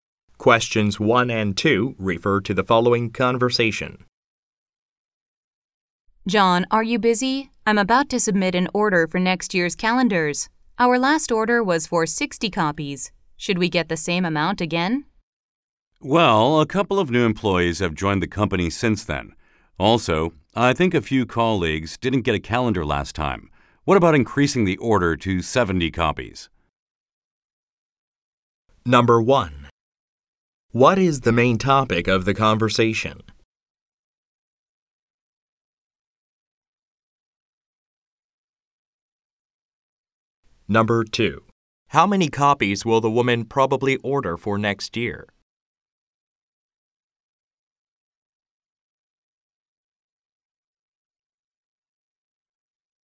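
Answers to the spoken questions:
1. Ordering next year's calendars
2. 70 copies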